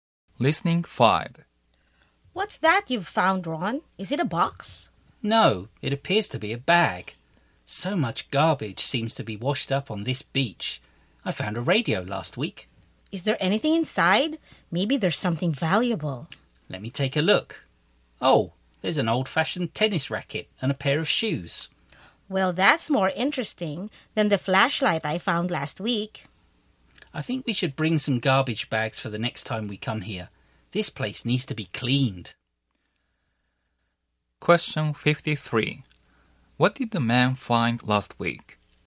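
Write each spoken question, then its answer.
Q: What did the man find last week?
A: A radio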